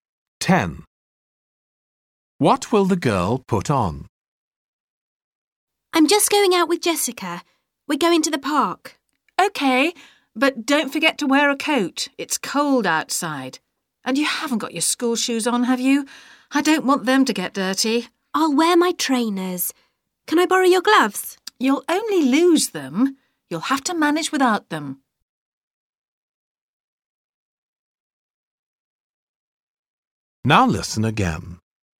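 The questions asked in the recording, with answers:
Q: What will the girl put on?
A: A coat and trainers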